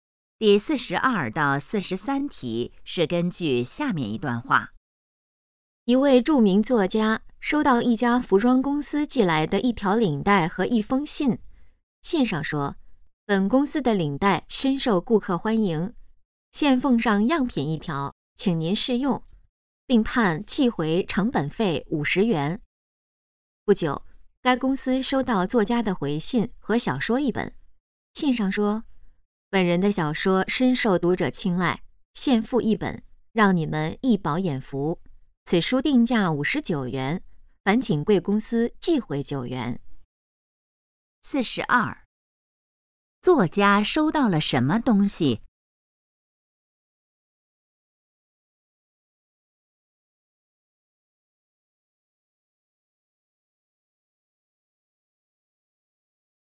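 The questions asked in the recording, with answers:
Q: 作家收到了什么东西?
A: 一条领带和一封信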